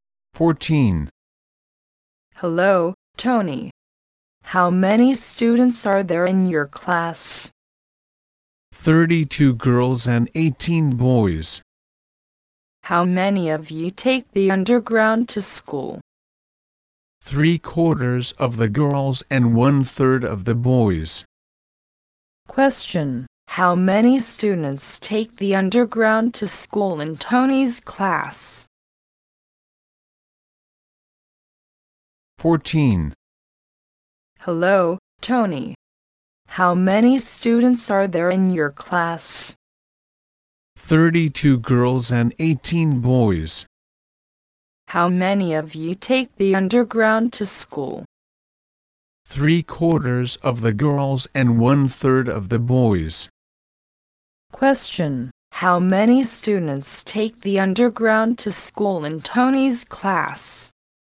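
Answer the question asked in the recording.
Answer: 30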